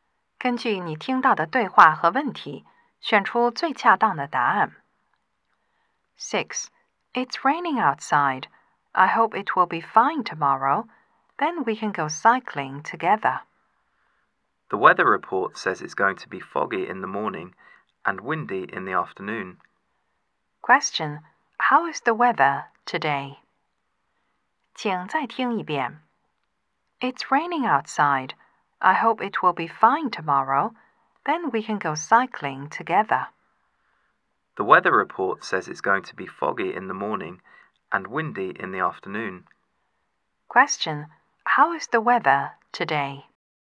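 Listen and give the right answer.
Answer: It's rainy.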